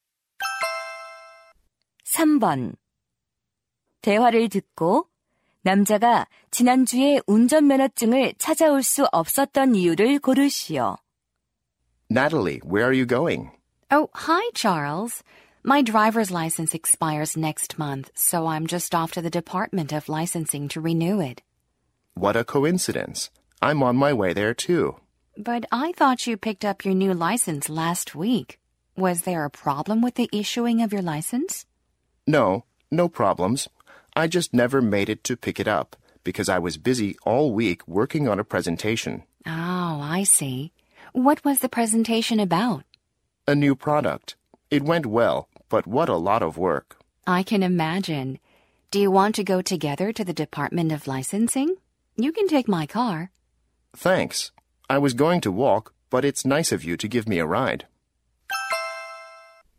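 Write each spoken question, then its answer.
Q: 대화를 듣고 남자가 지난주에 운전면허증을 찾아올 수 없었던 이유를 고르시오.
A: 발표 준비로 바빠서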